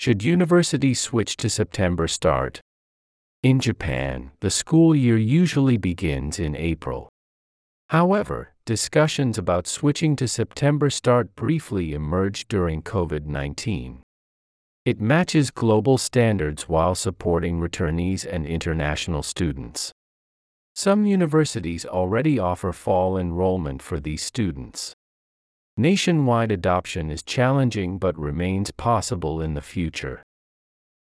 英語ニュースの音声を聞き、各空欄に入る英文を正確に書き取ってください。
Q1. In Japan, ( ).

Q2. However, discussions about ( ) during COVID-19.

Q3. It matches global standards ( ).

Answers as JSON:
{"1": "the school year usually begins in April", "2": "switching to September start briefly emerged", "3": "while supporting returnees and international students"}

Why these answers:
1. ⇒「usually(通常)」という副詞が入っており、「日本の現在の状況」を表していることに気づきましょう。
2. ⇒ この英文は「during COVID-19(コロナ禍の間)」の状況を表す過去の出来事のため、動詞は過去形になります。

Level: 中級